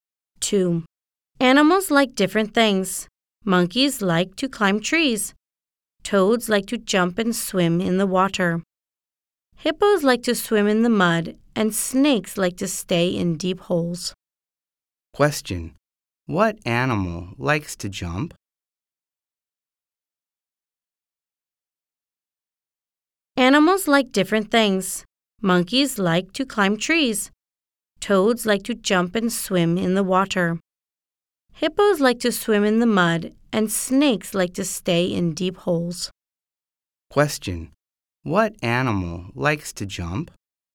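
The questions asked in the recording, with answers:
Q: Question. What animal likes to jump?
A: Toads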